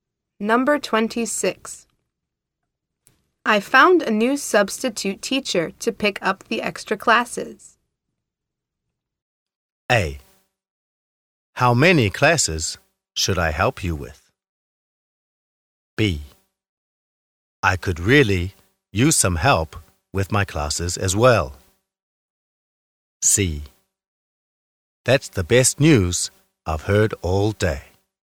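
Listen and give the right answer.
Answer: C: That's the best news I've heard all day.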